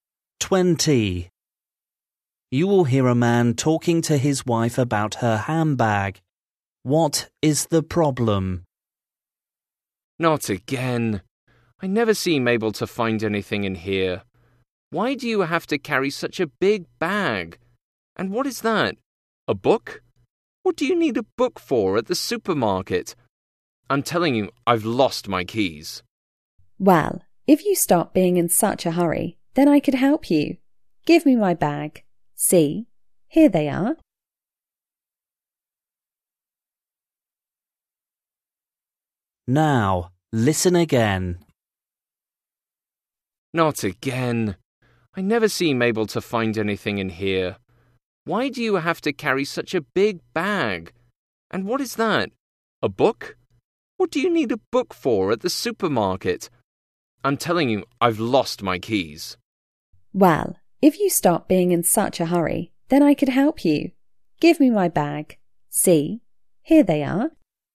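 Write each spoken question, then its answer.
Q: What is the problem?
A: he can't find his keys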